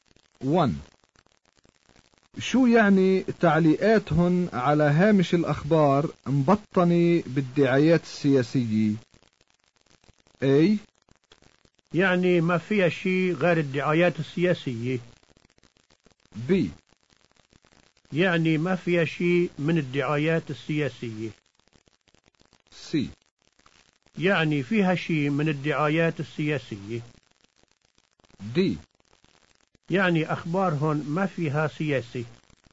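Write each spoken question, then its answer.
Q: شو يعني تعليقاتهن على هامش الأخبار مبطنة بالدعايات السياسية؟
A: C: يعني فيها شيء من الدعايات السياسية.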